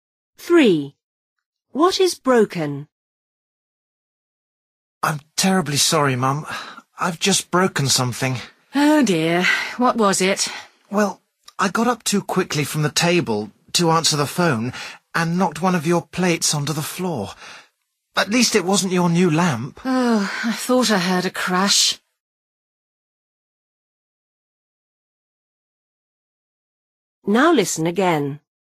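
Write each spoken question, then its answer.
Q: What is broken?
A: A plate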